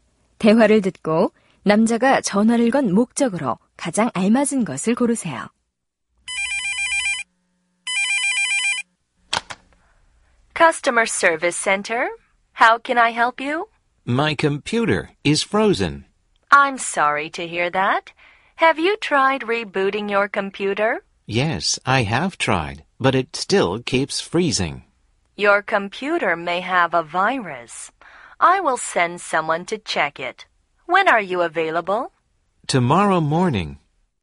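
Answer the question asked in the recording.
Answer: 컴퓨터 수리 요청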